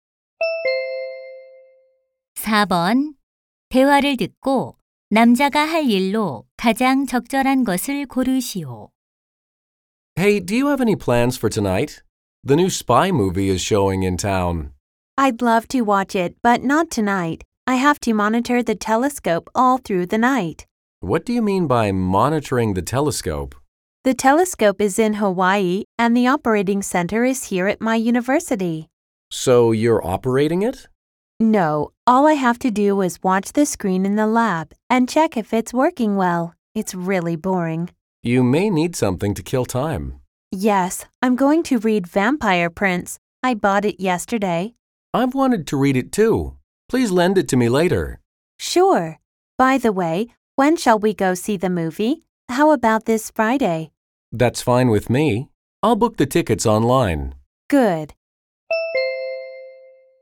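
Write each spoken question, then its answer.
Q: 대화를 듣고 남자가 할 일로 가장 적절한 것을 고르시오.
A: 영화표를 온라인으로 예매하기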